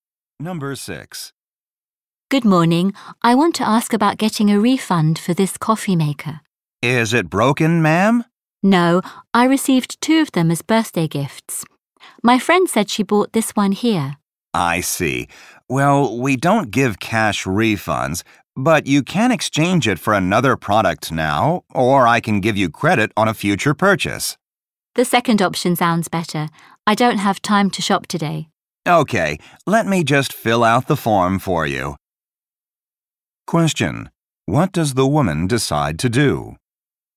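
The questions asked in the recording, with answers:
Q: Question. What does the woman decide to do?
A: Take store credit to use on a future purchase.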